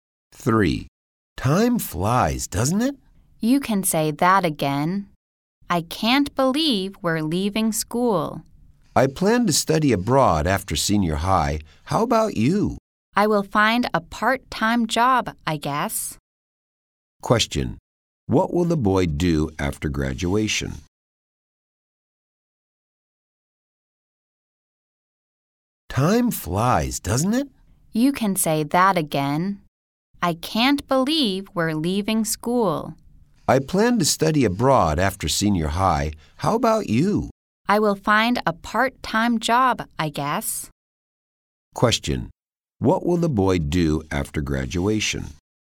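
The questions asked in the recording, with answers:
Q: What will the boy do after graduation?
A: Find a part-time job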